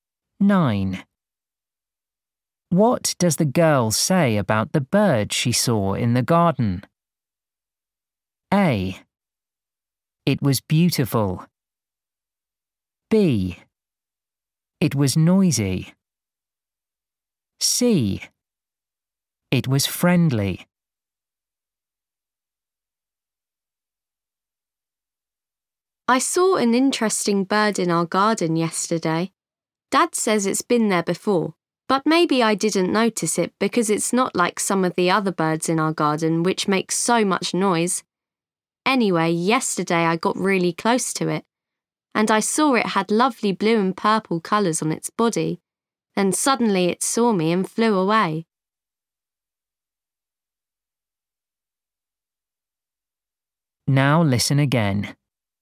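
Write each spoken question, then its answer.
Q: What does the girl say about the bird she saw in the garden?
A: A: It was beautiful.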